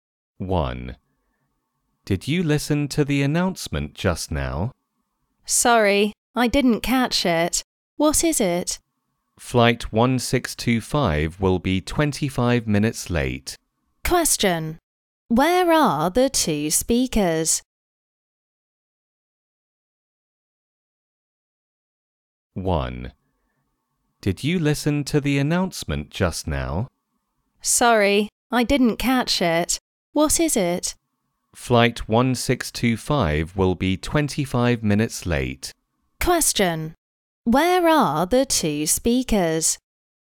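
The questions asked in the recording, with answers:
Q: Where are the two speakers?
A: At an airport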